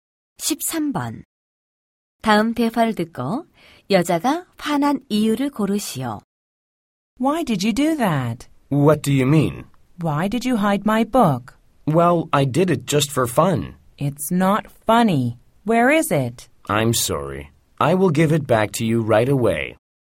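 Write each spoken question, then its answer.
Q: 다음 대화를 듣고 여자가 화난 이유를 고르시오.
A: 남자가 책을 숨겨서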